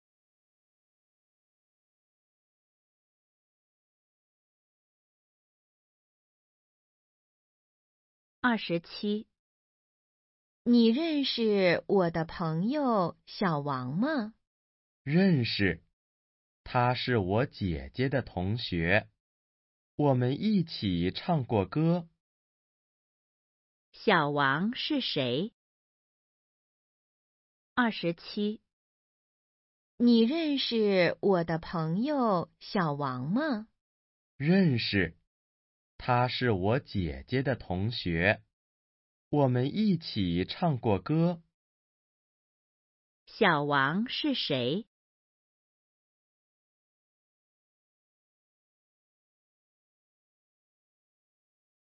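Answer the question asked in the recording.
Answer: 姐姐的同学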